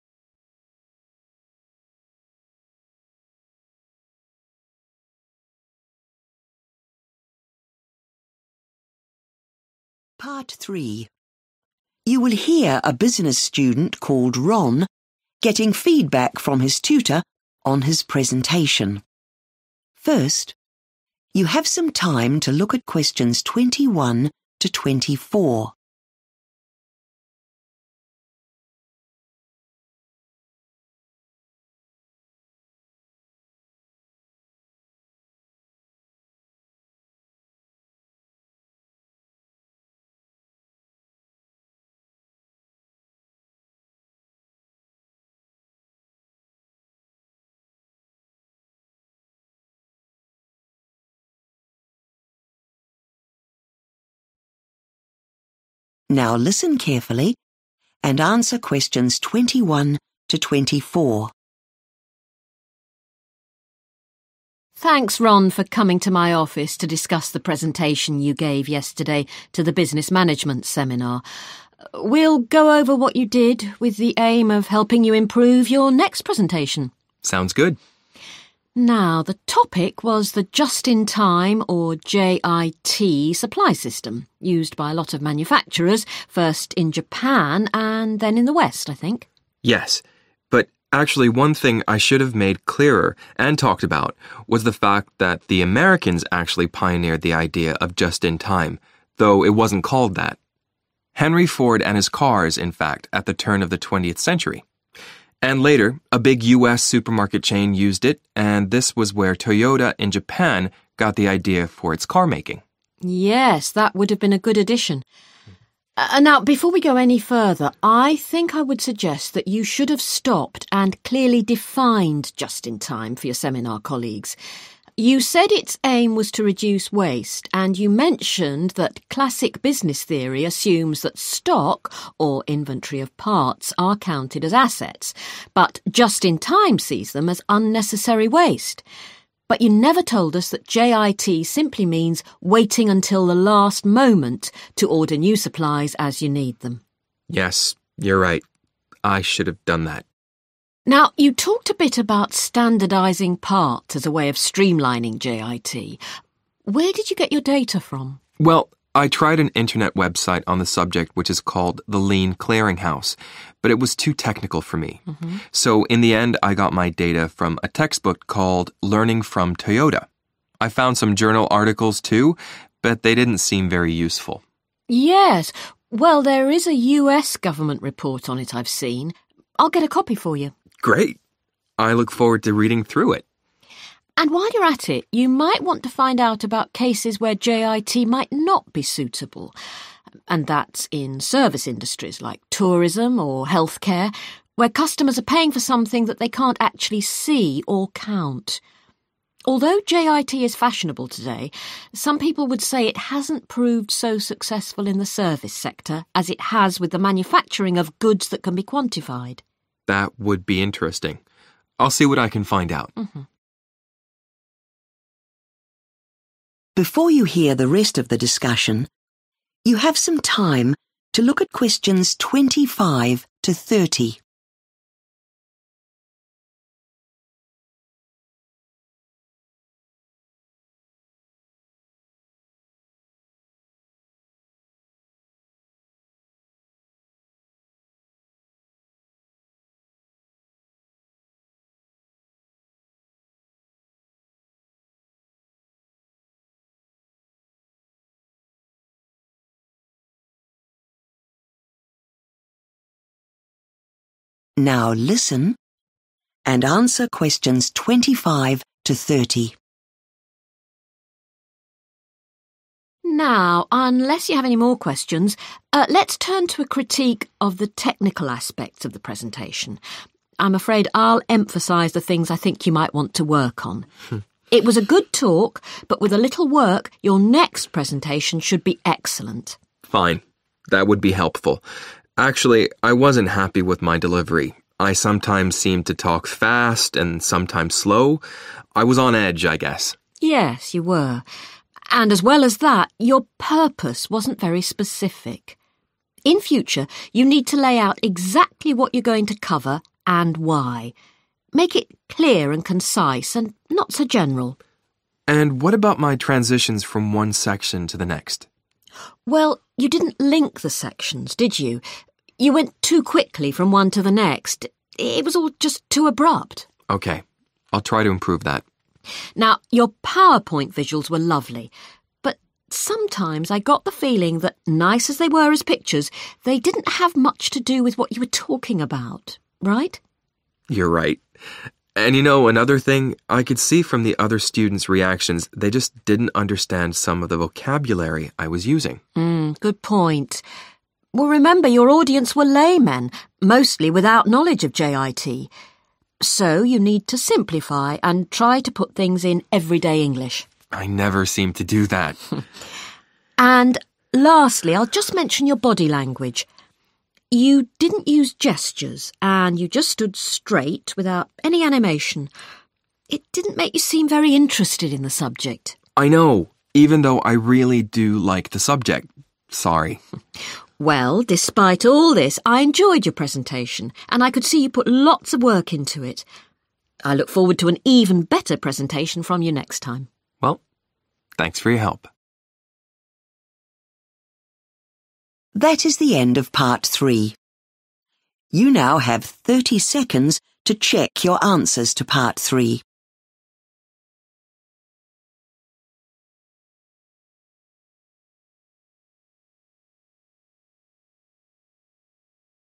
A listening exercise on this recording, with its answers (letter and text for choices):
Choose the correct letter, A, B or C.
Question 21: Ron suggests that in his presentation he should have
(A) given credit to the originators of the JIT idea.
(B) discussed why the Japanese adopted the JIT idea.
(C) explained how supermarkets used the JIT idea.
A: (A) given credit to the originators of the JIT idea.

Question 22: The tutor says that in his presentation Ron omitted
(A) a description of classic business theory.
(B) an introductory definition of JIT.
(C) a statement of the aims of JIT.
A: (B) an introductory definition of JIT.

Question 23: Ron says that he found his information on standardising parts from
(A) a website.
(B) journal articles.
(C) a textbook.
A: (C) a textbook.

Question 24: The tutor suggests that in the service sector, JIT is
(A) difficult to apply because of the absence of countable things.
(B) regarded by most members of staff as unfashionable.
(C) unlikely to be accepted by important clients.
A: (A) difficult to apply because of the absence of countable things.

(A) too informal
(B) too irregular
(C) too predictable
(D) too sudden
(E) too technical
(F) too unenthusiastic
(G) too loosely related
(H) too vague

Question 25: speed of delivery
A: (B) too irregular

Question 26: purpose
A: (H) too vague

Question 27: transitions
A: (D) too sudden

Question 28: visuals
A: (G) too loosely related

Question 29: vocabulary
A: (E) too technical

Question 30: body language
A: (F) too unenthusiastic